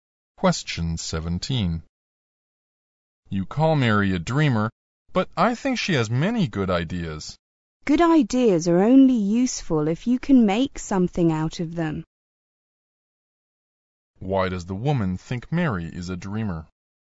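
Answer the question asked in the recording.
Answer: Her ideas are not practical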